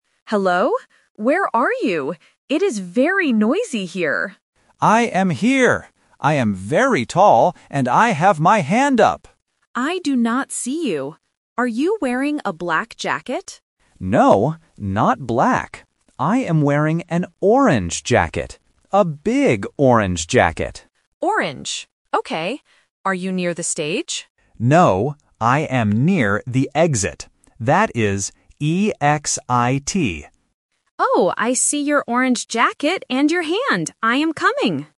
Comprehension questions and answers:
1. What does Friend B look like?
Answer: He is tall.

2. What is Friend B wearing?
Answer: An orange jacket

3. How do you spell the place where Friend B is standing?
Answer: E-X-I-T